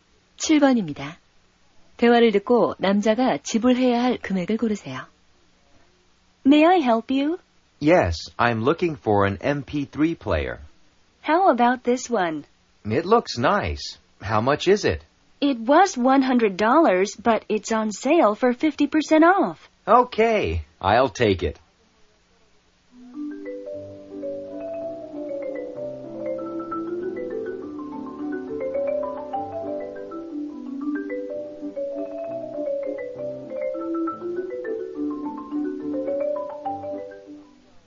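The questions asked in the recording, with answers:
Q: 대화를 듣고 남자가 지불해야 할 금액을 고르세요.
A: 50달러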